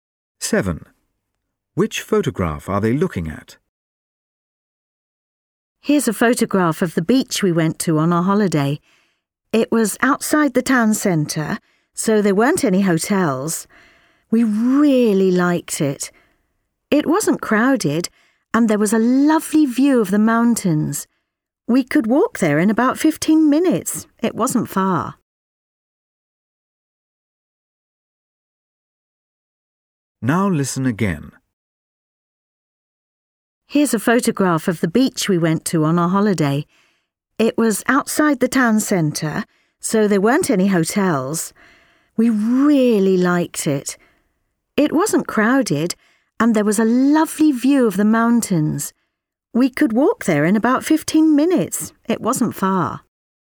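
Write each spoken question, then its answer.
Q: Which photograph are they looking at?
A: An uncrowded beach with no hotels and a view of the mountains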